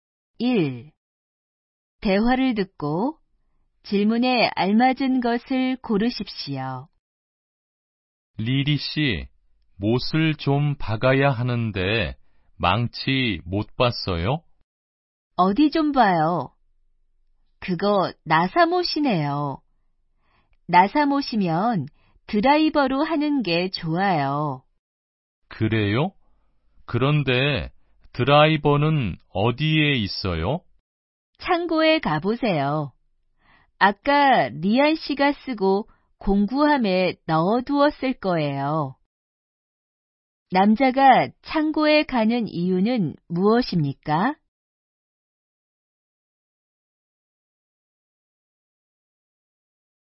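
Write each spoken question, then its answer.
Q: 남자가 창고에 가는 이유는 무엇입니까?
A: 드라이버를 가지러 가기 위해서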